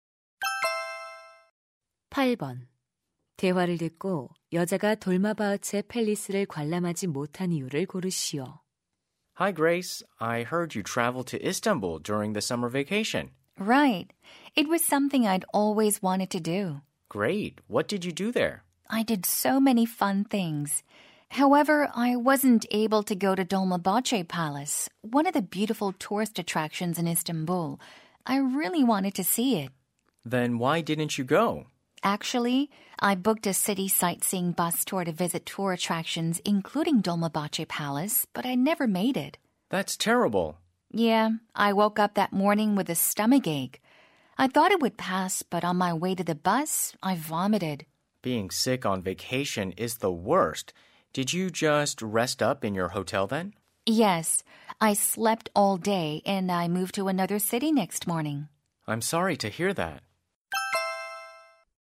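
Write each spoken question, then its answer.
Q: 대화를 듣고 여자가 돌마바흐체 팰리스를 관람하지 못한 이유를 고르시오.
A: 배탈이 나서 아팠기 때문에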